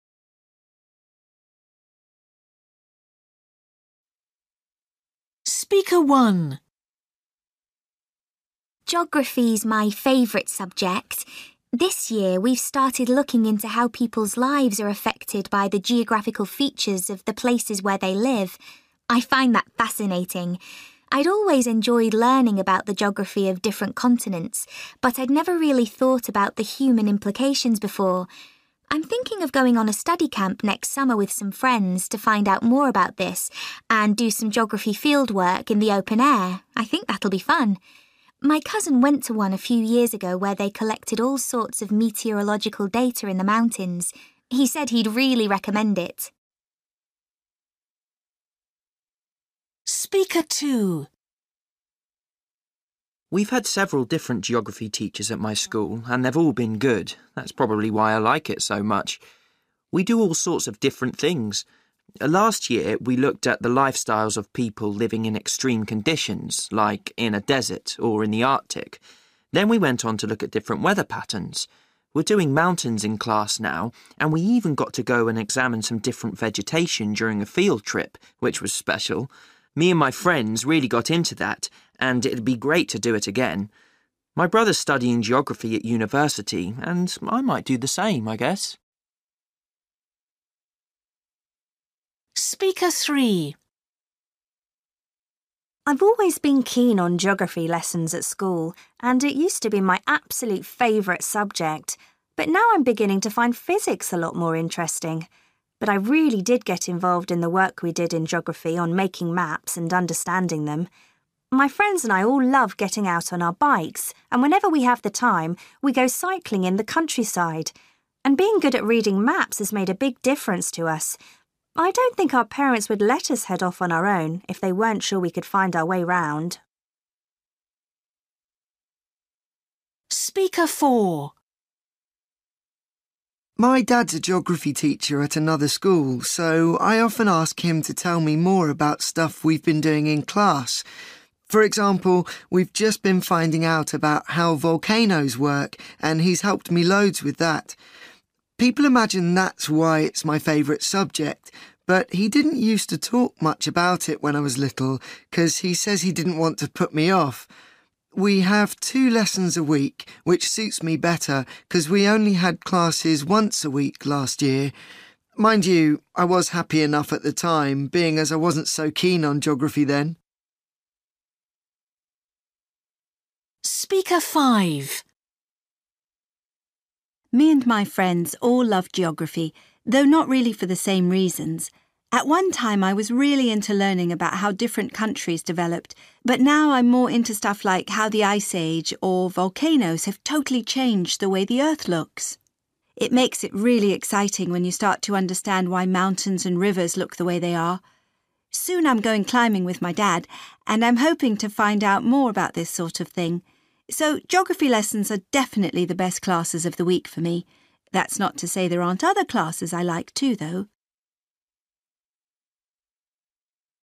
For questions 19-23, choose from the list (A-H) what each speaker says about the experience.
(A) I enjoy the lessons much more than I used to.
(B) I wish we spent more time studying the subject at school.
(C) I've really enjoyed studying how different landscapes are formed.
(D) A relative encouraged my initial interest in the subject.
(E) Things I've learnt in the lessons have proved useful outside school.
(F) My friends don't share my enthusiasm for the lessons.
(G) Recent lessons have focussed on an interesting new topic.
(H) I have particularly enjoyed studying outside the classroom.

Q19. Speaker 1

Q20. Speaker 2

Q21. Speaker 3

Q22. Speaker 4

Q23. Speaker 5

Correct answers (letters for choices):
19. G
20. H
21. E
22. A
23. C

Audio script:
Girl: Geography's my favourite subject. This year, we've started looking into how people's lives are affected by the geographical features of the places where they live. I find that fascinating. I'd always enjoyed learning about the geography of different continents, but I'd never really thought about the human implications before. I'm thinking of going on a study camp next summer with some friends to find out more about this and do some geography fieldwork in the open air – I think that'll be fun. My cousin went to one a few years ago where they collected all sorts of meteorological data in the mountains – he said he'd really recommend it.
Boy: We've had several different geography teachers at my school and they've all been good. That's probably why I like it so much. We do all sorts of different things. Last year, we looked at the lifestyles of people living in extreme conditions, like in a desert or in the Arctic. Then we went on to look at different weather patterns. We're doing mountains in class now and we even got to go and examine some different vegetation during a field trip, which was special. Me and my friends really got into that and it'd be great to do it again. My brother's studying geography at university and I might do the same, I guess.
Girl: I've always been keen on geography lessons at school and it used to be my absolute favourite subject – but now I'm beginning to find physics a lot more interesting. But I really did get involved in the work we did in geography on making maps and understanding them. My friends and I all love getting out on our bikes, and whenever we have the time, we go cycling in the countryside – and being good at reading maps has made a big difference to us. I don't think our parents would let us head off on our own if they weren't sure we could find our way round.
Boy: My dad's a geography teacher at another school, so I often ask him to tell me more about stuff we've been doing in class – for example, we've just been finding out about how volcanoes work and he's helped me loads with that. People imagine that's why it's my favourite subject, but he didn't use to talk much about it when I was little cos he says he didn't want to put me off. We have two lessons a week, which suits me better cos we only had classes once a week last year. Mind you, I was happy enough at the time, being as I wasn't so keen on geography then.
Girl: Me and my friends all love geography – though not really for the same reasons. At one time, I was really into learning about how different countries developed, but now I'm more into stuff like how the ice age or volcanoes have totally changed the way the earth looks. It makes it really exciting when you start to understand why mountains and rivers look the way they are. Soon I'm going climbing with my dad and I'm hoping to find out more about this sort of thing. So geography lessons are definitely the best classes of the week for me – that's not to say there aren't other classes I like too, though.